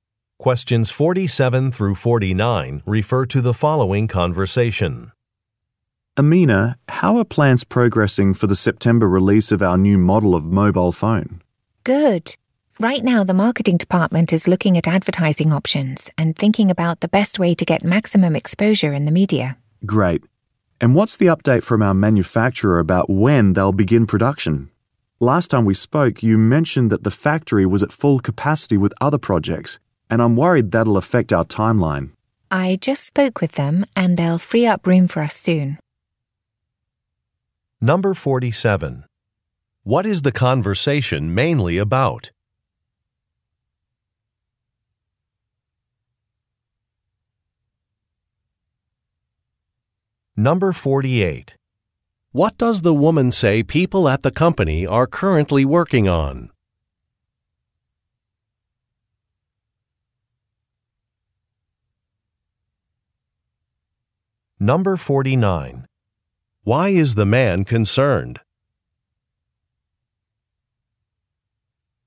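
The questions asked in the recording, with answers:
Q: What is the conversation mainly about?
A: The release of a new mobile phone

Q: What does the woman say people at the company are currently working on?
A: Advertising options

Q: Why is the man concerned?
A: The factory is at full capacity, which could affect the timeline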